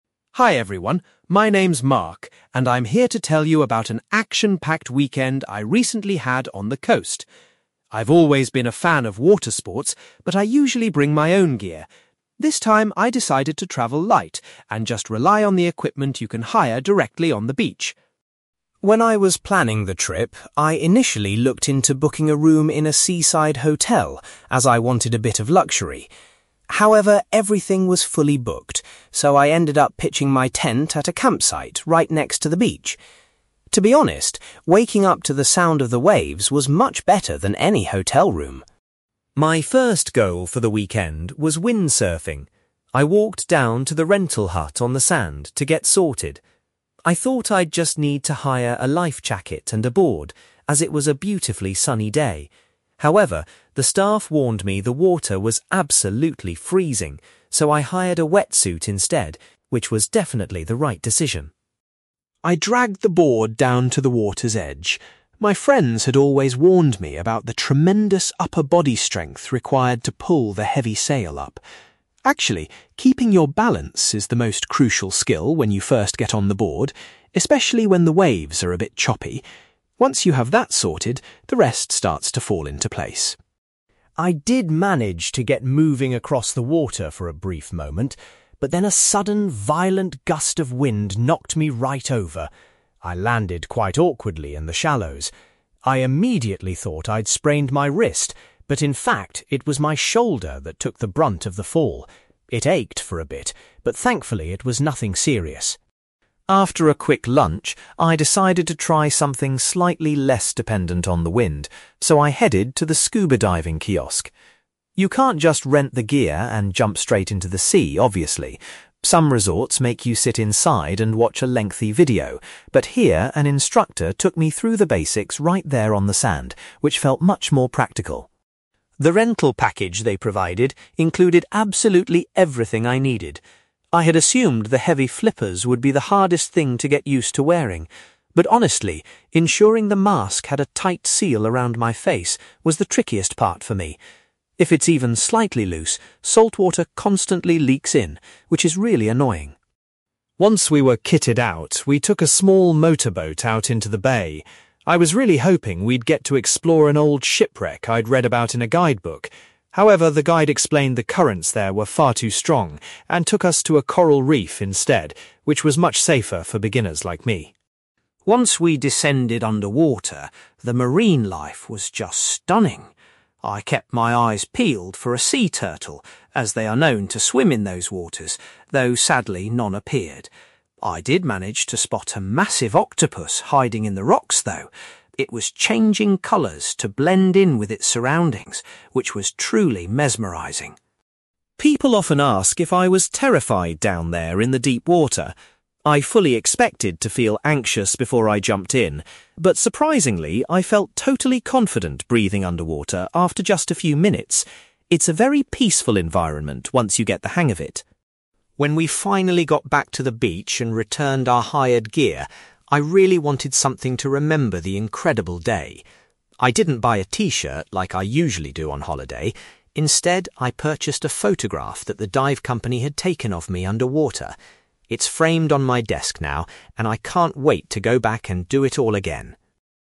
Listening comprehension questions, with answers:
You will hear a young man called Mark talking about his recent experience trying out water sports on a beach holiday. For questions 9-18, complete the sentences with a word or short phrase.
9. Mark originally intended to stay in a hotel, but chose a (9)........................... close to the sea.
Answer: campsite

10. Because of the water temperature, Mark realised he had to rent a (10)........................... rather than just a lifejacket.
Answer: wetsuit

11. Mark discovered that having good (11)........................... was the most important thing for a beginner windsurfer.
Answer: balance

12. Mark injured his (12)........................... when a strong gust of wind made him fall off the board.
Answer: shoulder

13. Before he was allowed to go scuba diving, Mark had to listen to an (13)........................... on the beach.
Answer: instructor

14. Mark found it quite difficult to properly adjust his (14)........................... from the hired equipment.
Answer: mask

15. Mark's diving group visited a (15)........................... because a local shipwreck was unsuitable for novices.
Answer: coral reef

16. Mark was particularly thrilled to see an (16)........................... while he was swimming underwater.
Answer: octopus

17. Mark says he felt remarkably (17)........................... about breathing beneath the surface of the water.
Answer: confident

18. As a souvenir of his diving experience, Mark bought a (18)........................... at the end of the day.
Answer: photograph

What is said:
Mark: Hi everyone, my name is Mark, and I'm here to tell you about an action-packed weekend I recently had on the coast. I've always been a fan of water sports, but I usually bring my own gear. This time, I decided to travel light and just rely on the equipment you can hire directly on the beach.
When I was planning the trip, I initially looked into booking a room in a seaside hotel, as I wanted a bit of luxury. However, everything was fully booked, so I ended up pitching my tent at a campsite right next to the beach. To be honest, waking up to the sound of the waves was much better than any hotel room!
My first goal for the weekend was windsurfing. I walked down to the rental hut on the sand to get sorted. I thought I'd just need to hire a lifejacket and a board, as it was a beautifully sunny day. However, the staff warned me the water was absolutely freezing, so I hired a wetsuit instead, which was definitely the right decision!
I dragged the board down to the water's edge. My friends had always warned me about the tremendous upper body strength required to pull the heavy sail up. Actually, keeping your balance is the most crucial skill when you first get on the board, especially when the waves are a bit choppy. Once you have that sorted, the rest starts to fall into place.
I did manage to get moving across the water for a brief moment, but then a sudden, violent gust of wind knocked me right over. I landed quite awkwardly in the shallows. I immediately thought I'd sprained my wrist, but in fact, it was my shoulder that took the brunt of the fall. It ached for a bit, but thankfully it was nothing serious.
After a quick lunch, I decided to try something slightly less dependent on the wind, so I headed to the scuba diving kiosk. You can't just rent the gear and jump straight into the sea, obviously. Some resorts make you sit inside and watch a lengthy video, but here an instructor took me through the basics right there on the sand, which felt much more practical.
The rental package they provided included absolutely everything I needed. I had assumed the heavy flippers would be the hardest thing to get used to wearing. But honestly, ensuring the mask had a tight seal around my face was the trickiest part for me. If it's even slightly loose, saltwater constantly leaks in, which is really annoying.
Once we were kitted out, we took a small motorboat out into the bay. I was really hoping we'd get to explore an old shipwreck I'd read about in a guidebook. However, the guide explained the currents there were far too strong, and took us to a coral reef instead, which was much safer for beginners like me.
Once we descended underwater, the marine life was just stunning. I kept my eyes peeled for a sea turtle, as they are known to swim in those waters, though sadly none appeared. I did manage to spot a massive octopus hiding in the rocks, though! It was changing colours to blend in with its surroundings, which was truly mesmerising.
People often ask if I was terrified down there in the deep water. I fully expected to feel anxious before I jumped in, but surprisingly, I felt totally confident breathing underwater after just a few minutes. It's a very peaceful environment once you get the hang of it.
When we finally got back to the beach and returned our hired gear, I really wanted something to remember the incredible day. I didn't buy a t-shirt like I usually do on holiday; instead, I purchased a photograph that the dive company had taken of me underwater. It's framed on my desk now, and I can't wait to go back and do it all again!

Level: B2